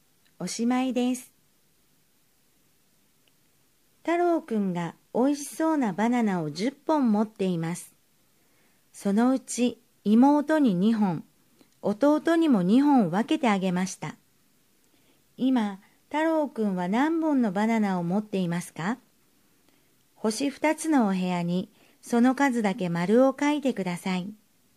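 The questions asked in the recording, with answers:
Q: 今、太郎くんは何本のバナナを持っていますか?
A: 6本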